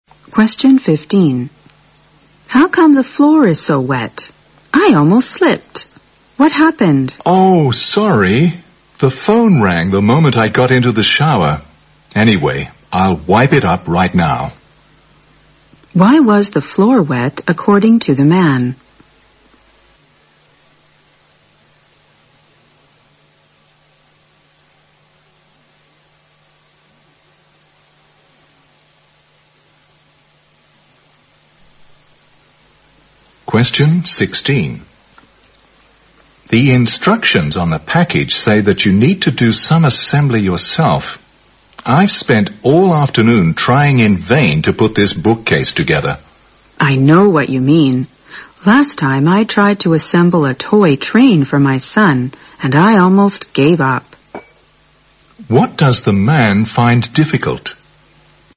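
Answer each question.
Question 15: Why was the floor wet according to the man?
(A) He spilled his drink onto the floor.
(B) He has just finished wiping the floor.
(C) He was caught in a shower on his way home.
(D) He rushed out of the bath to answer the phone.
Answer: D

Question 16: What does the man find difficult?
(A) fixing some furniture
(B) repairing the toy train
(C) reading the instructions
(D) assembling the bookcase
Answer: D

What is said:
W: How come the floor is so wet? I almost slipped. What happened?
M: Oh, sorry. The phone rang the moment I got into the shower. Anyway, I'll wipe it right now.
Q: Why was the floor wet according to the man?
M: The instructions on the package said you need to do some assembly yourself. I spent all afternoon trying in vain to put this bookcase together.
W: I know what you mean. Last time I tried to assemble a toy train for my son and I almost gave up.
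Q: What does the man find difficult?

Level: 六级

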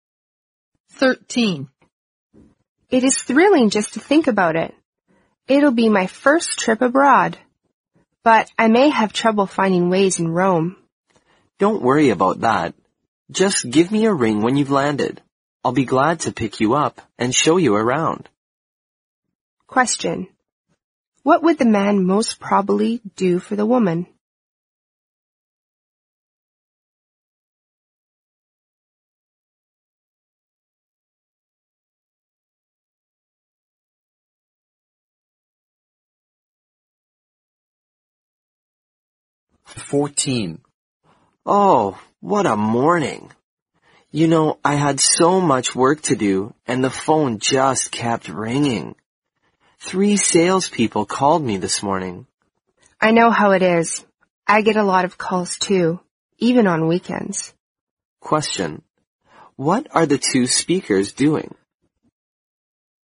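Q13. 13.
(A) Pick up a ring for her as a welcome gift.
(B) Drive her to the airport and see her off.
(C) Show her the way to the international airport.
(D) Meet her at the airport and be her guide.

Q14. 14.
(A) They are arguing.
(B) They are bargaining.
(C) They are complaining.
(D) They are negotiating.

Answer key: 13D, 14C

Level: 四级

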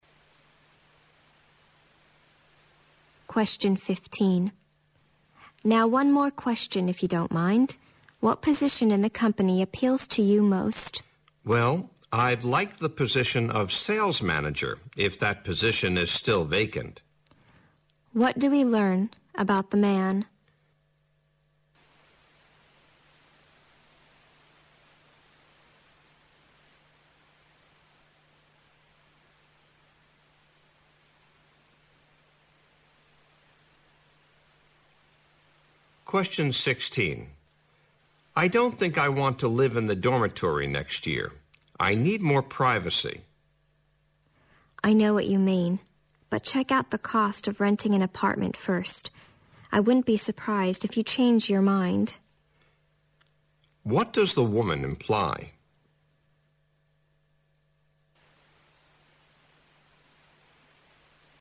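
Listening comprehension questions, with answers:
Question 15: What do we learn about the man?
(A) He is an experienced sales manager.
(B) He is being interviewed for a job.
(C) He is a close friend of the woman.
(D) He is good at answering tricky questions.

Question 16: What does the woman imply?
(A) The man should consider his privacy first.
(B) The man will choose a low-rent apartment.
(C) The man is not certain if he can find a quieter place.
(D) The man is unlikely to move out of the dormitory.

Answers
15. B
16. D

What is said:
W: now one more question if you don't mind, what position in the company appeals to you most?
M: Well, I'd like the position of sales manager if that position is still vacant.
Q: What do we learn about the man?
M: I don't think I want to live in the dormitory next year. I need more privacy.
W: I know what you mean. But check out the cost if renting an apartment first. 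I won't be surprised if you change your mind.
Q: What does the woman imply?

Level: 大学英语四级

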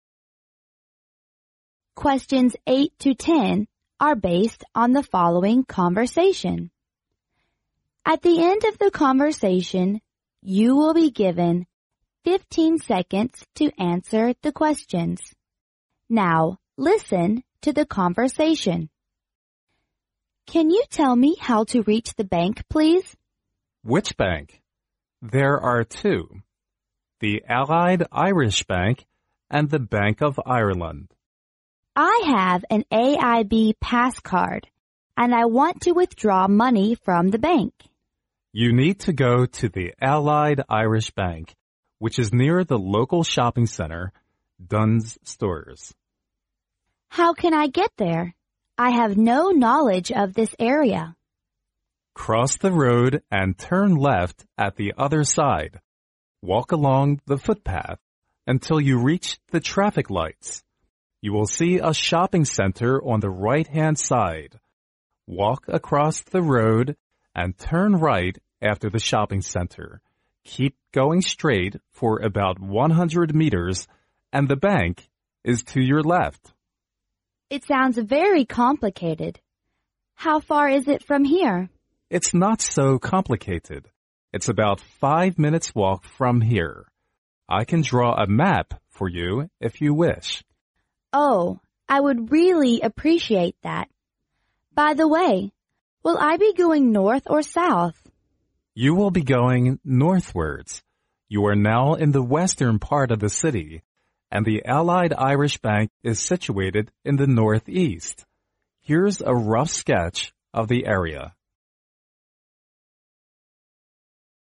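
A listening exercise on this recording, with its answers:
Now,listen to the conversation.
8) What does the woman want to do?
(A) Withdraw some money,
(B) Deposit some money.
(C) Get to know the neighborhood.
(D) Ask the way to the museum.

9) What can be inferred about the two banks?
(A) They are far away from each other.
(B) The Allied Irish Bank is near Dunnes Stores.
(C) The Allied Irish Bank is 100m from the traffic lights.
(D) The Bank of Ireland is located in the North East.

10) Which of the following statements is INCORRECT?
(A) The woman appears to be a stranger of this area.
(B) The woman will be going northwards.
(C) The man thinks the route is not very complicated,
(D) The man would draw a rough sketch of the bank.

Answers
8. A
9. B
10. D

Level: 专业四级

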